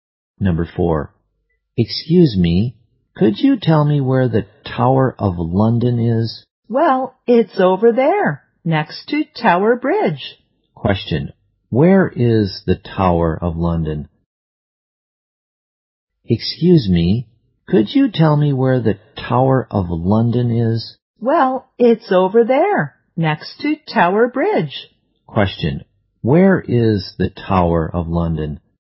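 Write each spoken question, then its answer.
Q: where is the Tower of London?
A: Next to Tower Bridge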